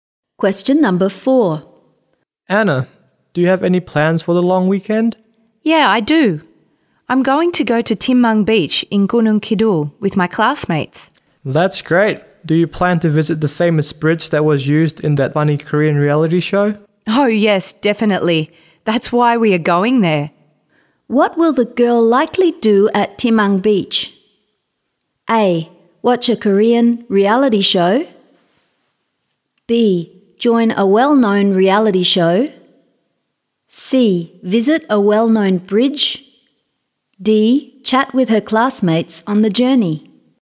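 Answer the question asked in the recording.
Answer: C: Visit a well-known bridge.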